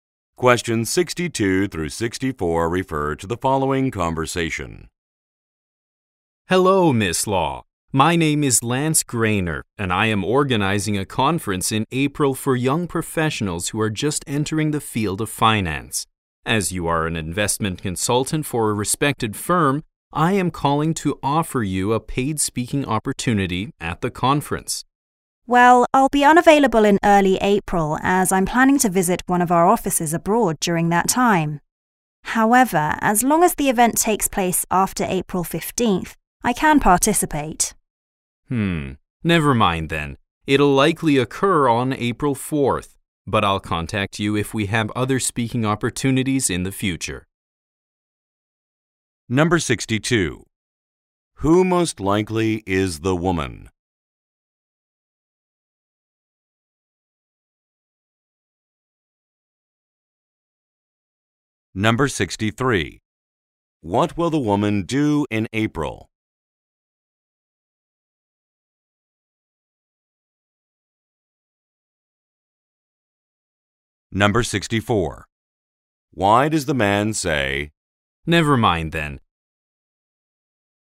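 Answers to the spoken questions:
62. An investment consultant
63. Visit an overseas office
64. The event is on April 4, when she is unavailable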